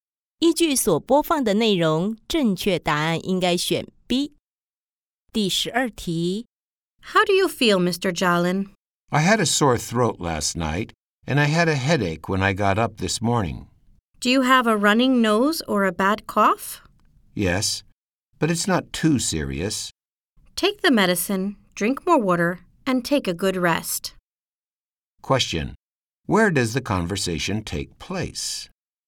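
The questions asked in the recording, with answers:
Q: Question: Where does the conversation take place?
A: At a doctor's office (clinic)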